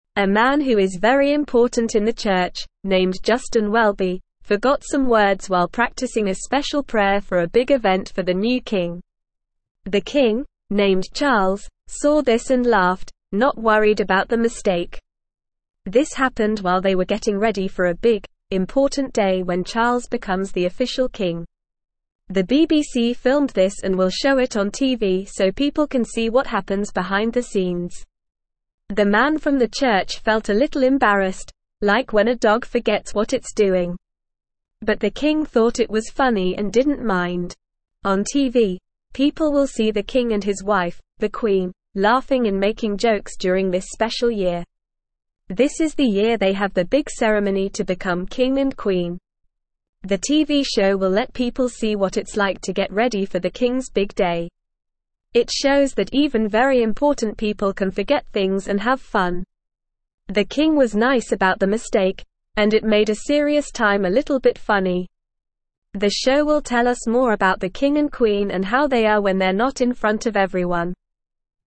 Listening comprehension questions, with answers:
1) A man who is very important in the church, named Justin (1)______, forgot some (2)______ while practicing a (3)______ prayer for a big event for the new King.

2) A man who is very important in the church, named Justin (1)______, forgot some (2)______ while practicing a (3)______ prayer for a big event for the new King.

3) A man who is very important in the church, named Justin (1)______, forgot some (2)______ while practicing a (3)______ prayer for a big event for the new King.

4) This happened while they were getting ready for a big, important day when (4)______ becomes the official King.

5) The BBC (5)______ this and will (6)______ it on TV so people can see what happens behind the scenes.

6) The BBC (5)______ this and will (6)______ it on TV so people can see what happens behind the scenes.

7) On TV, people will see the King and his wife, the Queen, laughing and making jokes during this special (7)______.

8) This is the year they have their big (8)______ to (9)______ King and Queen.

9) This is the year they have their big (8)______ to (9)______ King and Queen.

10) It shows that even very (10)______ people can forget (11)______ and have fun.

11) It shows that even very (10)______ people can forget (11)______ and have fun.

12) The King was nice about the mistake, and it made a serious time a (12)______ bit funny.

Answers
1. Welby
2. words
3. special
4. Charles
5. filmed
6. show
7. year
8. ceremony
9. become
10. important
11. things
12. little

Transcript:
A man who is very important in the church, named Justin Welby, forgot some words while practicing a special prayer for a big event for the new King. The King, named Charles, saw this and laughed, not worried about the mistake. This happened while they were getting ready for a big, important day when Charles becomes the official King. The BBC filmed this and will show it on TV so people can see what happens behind the scenes.
The man from the church felt a little embarrassed, like when a dog forgets what it's doing. But the King thought it was funny and didn't mind. On TV, people will see the King and his wife, the Queen, laughing and making jokes during this special year. This is the year they have their big ceremony to become King and Queen.
The TV show will let people see what it's like to get ready for the King's big day. It shows that even very important people can forget things and have fun. The King was nice about the mistake, and it made a serious time a little bit funny. The show will tell us more about the King and Queen and how they are when they're not in front of everyone.

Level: Level 2